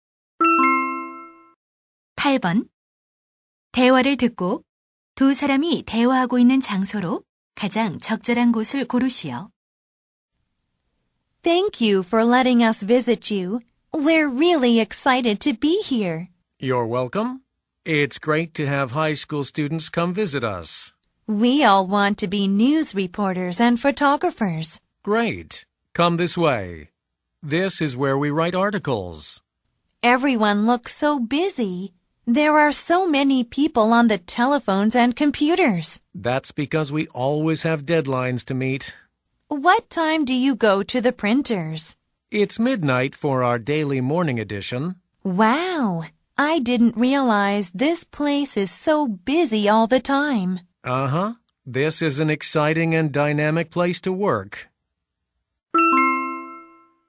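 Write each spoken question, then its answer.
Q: 대화를 듣고 두 사람이 대화하고 있는 장소로 가장 적절한 곳을 고르시오.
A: 신문사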